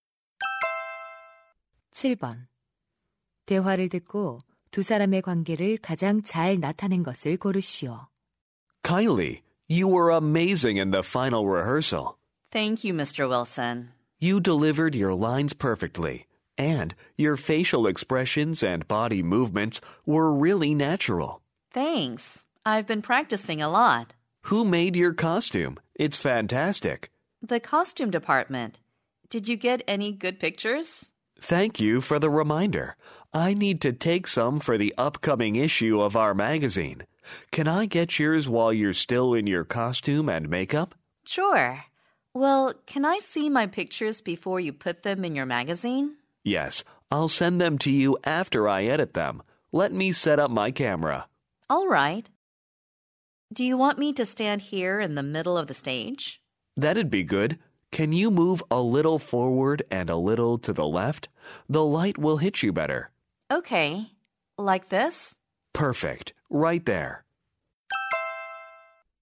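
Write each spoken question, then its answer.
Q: 대화를 듣고 두 사람의 관계를 가장 잘 나타낸 것을 고르시오.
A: 연극 배우 - 잡지 사진 기자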